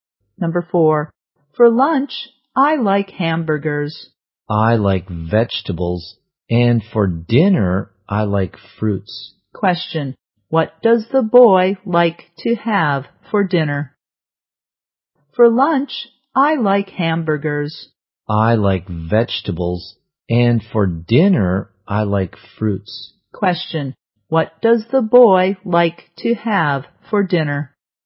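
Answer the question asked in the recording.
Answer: Fruits.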